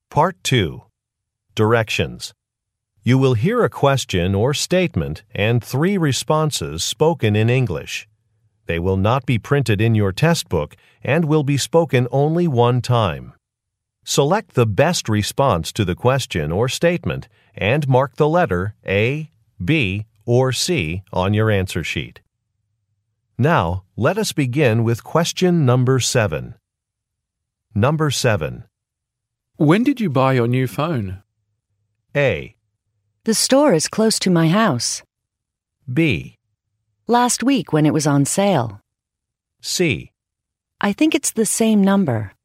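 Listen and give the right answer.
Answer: Last week when it was on sale.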